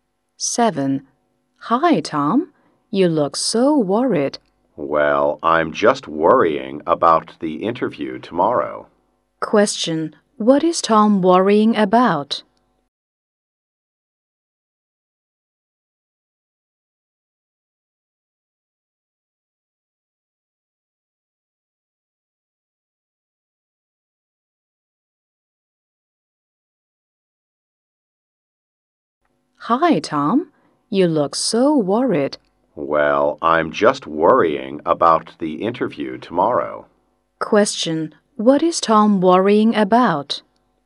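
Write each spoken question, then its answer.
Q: Question. What is Tom worrying about?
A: The interview tomorrow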